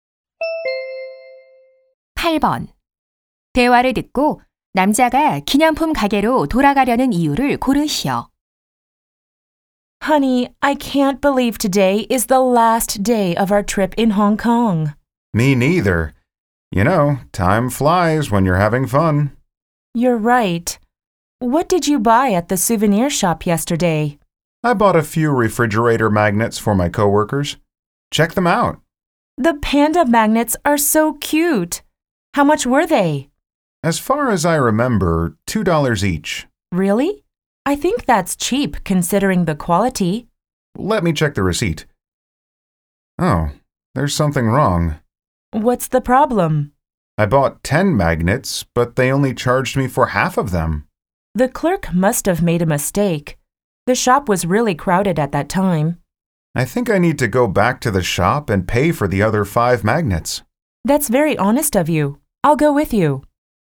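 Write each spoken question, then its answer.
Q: 대화를 듣고 남자가 기념품 가게로 돌아가려는 이유를 고르시오.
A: 계산되지 않은 자석 5개 값을 지불하려고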